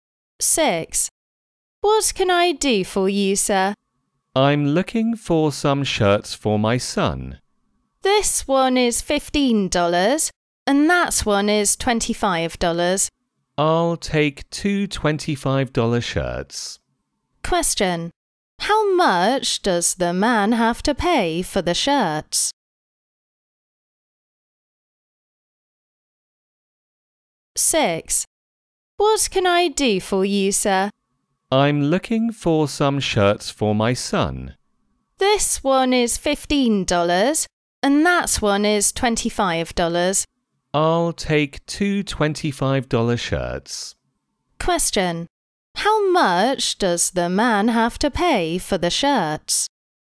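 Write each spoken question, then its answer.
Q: How much does the man have to pay for the shirts?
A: $50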